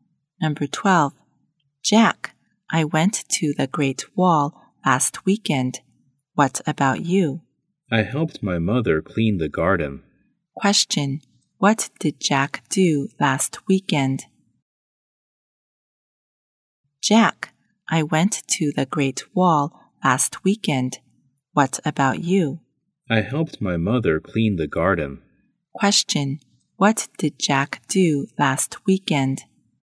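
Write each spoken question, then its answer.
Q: Question, what did Jack do last weekend?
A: He helped his mother clean the garden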